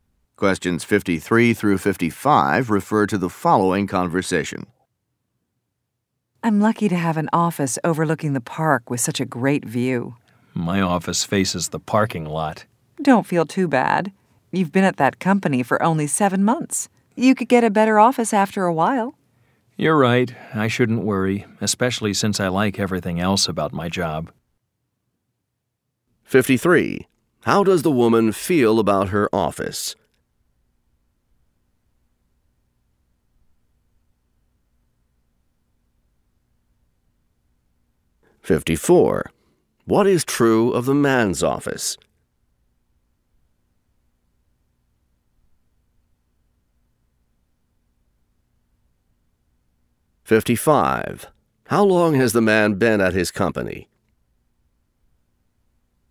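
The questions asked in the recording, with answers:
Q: How does the woman feel about her office?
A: She is lucky; it has a great view of the park

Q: What is true of the man's office?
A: It faces the parking lot

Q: How long has the man been at his company?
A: 7 months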